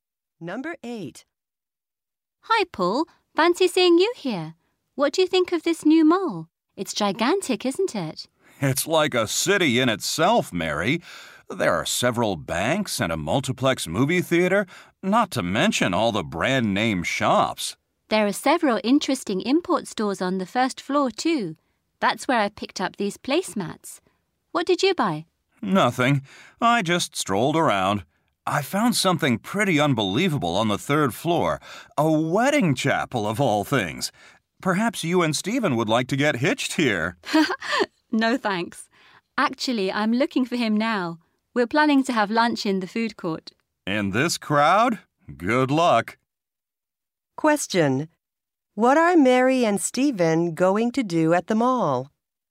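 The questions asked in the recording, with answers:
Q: What are Mary and Stephen going to do at the mall?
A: Have lunch in the food court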